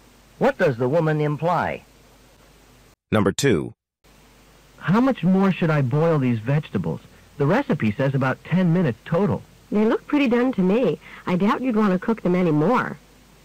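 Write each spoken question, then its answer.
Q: What does the woman mean?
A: The vegetables are already done and shouldn't be boiled any longer.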